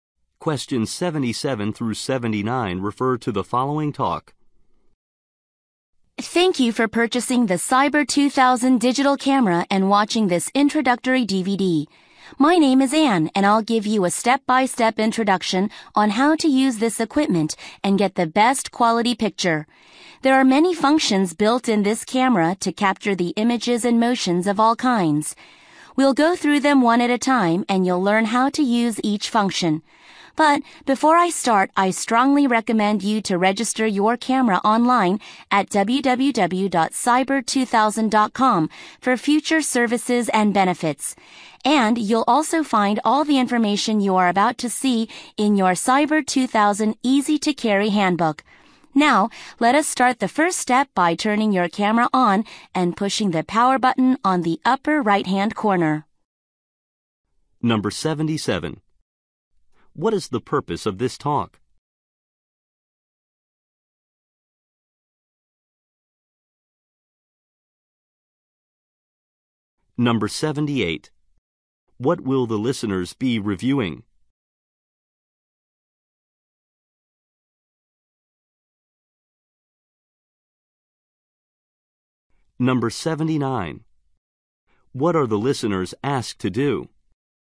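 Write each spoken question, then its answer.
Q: What is the purpose of this talk?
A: To explain how to use a new digital camera

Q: What are the listeners asked to do?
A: Register the camera online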